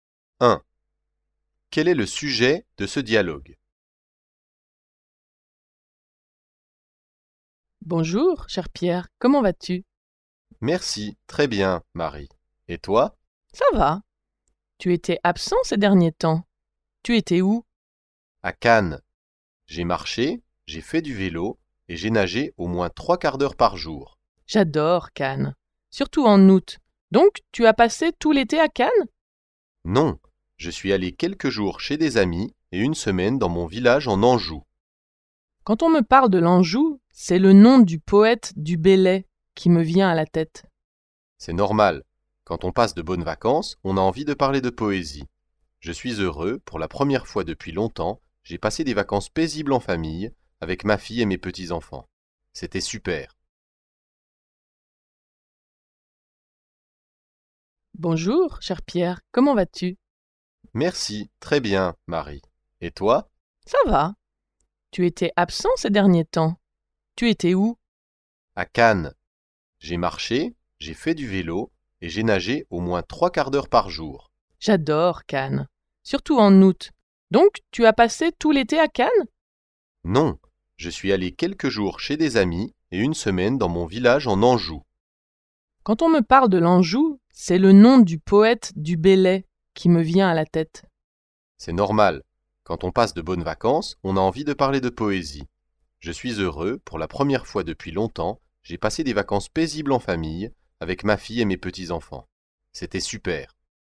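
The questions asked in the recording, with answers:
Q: Quel est le sujet de ce dialogue?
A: Les vacances de Pierre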